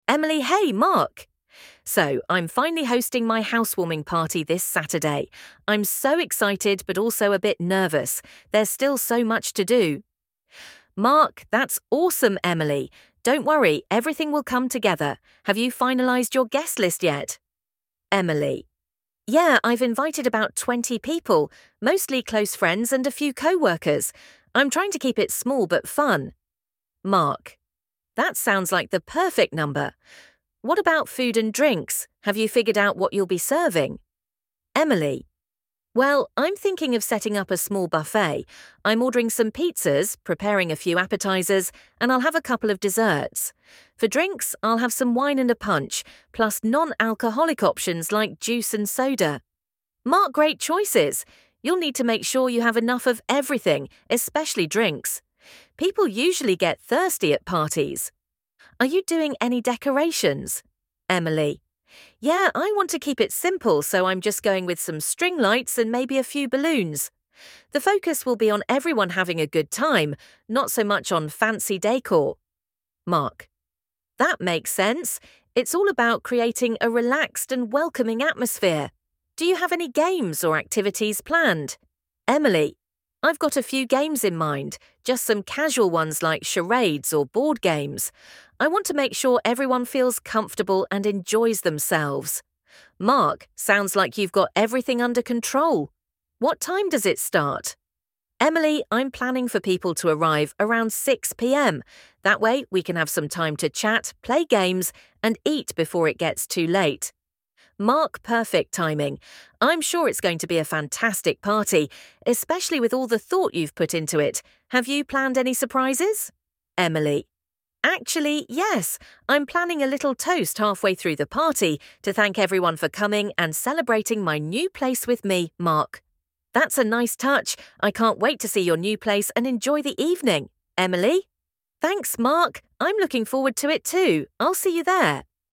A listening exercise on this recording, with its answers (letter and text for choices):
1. When is Emily's housewarming party?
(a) Friday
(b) Saturday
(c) Sunday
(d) Monday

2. How many people is Emily inviting to the party?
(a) About 10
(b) About 20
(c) About 30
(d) About 50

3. What type of food is Emily planning to serve?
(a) A full-course meal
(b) Just snacks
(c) A buffet with pizza and appetizers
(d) Barbecue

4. Which drinks will be available at the party?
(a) Only alcoholic drinks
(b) Only non-alcoholic drinks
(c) A mix of wine, punch, and non-alcoholic drinks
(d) Water only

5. How is Emily decorating her house for the party?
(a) With string lights and a few balloons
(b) With flowers and candles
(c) With themed decorations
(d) With no decorations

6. What type of activities does Emily plan to include?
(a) A dance party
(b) Casual games like charades and board games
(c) Watching a movie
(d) A formal speech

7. What time will the party start?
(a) 4 PM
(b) 5 PM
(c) 6 PM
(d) 8 PM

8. What surprise is Emily planning during the party?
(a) A special guest appearance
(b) A toast to thank her guests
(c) A live band performance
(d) A raffle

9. How does Emily want her guests to feel at the party?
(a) Competitive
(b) Relaxed and comfortable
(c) Excited and loud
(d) Formal and elegant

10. What is Emily's main concern about hosting the party?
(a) Not having enough food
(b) Making sure everyone has fun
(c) The decorations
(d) Arriving guests on time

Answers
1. (b) Saturday
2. (b) About 20
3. (c) A buffet with pizza and appetizers
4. (c) A mix of wine, punch, and non-alcoholic drinks
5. (a) With string lights and a few balloons
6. (b) Casual games like charades and board games
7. (c) 6 PM
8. (b) A toast to thank her guests
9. (b) Relaxed and comfortable
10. (b) Making sure everyone has fun

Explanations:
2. Yeah, I've invited about 20 people—mostly close friends and a few coworkers. I'm trying to keep it small but fun.

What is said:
[Person A: Emily]
Hey, Mark! So, I'm finally hosting my housewarming party this Saturday. I'm so excited, but also a bit nervous. There's still so much to do!
[Person B: Mark]
That's awesome, Emily! Don't worry, everything will come together. Have you finalized your guest list yet?
[Emily]
Yeah, I've invited about 20 people—mostly close friends and a few coworkers. I'm trying to keep it small but fun.
[Mark]
That sounds like the perfect number. What about food and drinks? Have you figured out what you'll be serving?
[Emily]
Well, I'm thinking of setting up a small buffet. I'm ordering some pizzas, preparing a few appetizers, and I'll have a couple of desserts. For drinks, I'll have some wine and a punch, plus non-alcoholic options like juice and soda.
[Mark]
Great choices! You'll need to make sure you have enough of everything, especially drinks. People usually get thirsty at parties. Are you doing any decorations?
[Emily]
Yeah, I want to keep it simple, so I'm just going with some string lights and maybe a few balloons. The focus will be on everyone having a good time, not so much on fancy décor.
[Mark]
That makes sense. It's all about creating a relaxed and welcoming atmosphere. Do you have any games or activities planned?
[Emily]
I've got a few games in mind—just some casual ones like charades or board games. I want to make sure everyone feels comfortable and enjoys themselves.
[Mark]
Sounds like you've got everything under control! What time does it start?
[Emily]
I'm planning for people to arrive around 6 PM. That way, we can have some time to chat, play games, and eat before it gets too late.
[Mark]
Perfect timing. I'm sure it's going to be a fantastic party, especially with all the thought you've put into it. Have you planned any surprises?
[Emily]
Actually, yes! I'm planning a little toast halfway through the party to thank everyone for coming and celebrating my new place with me.
[Mark]
That's a nice touch. I can't wait to see your new place and enjoy the evening!
[Emily]
Thanks, Mark! I'm looking forward to it too. I'll see you there!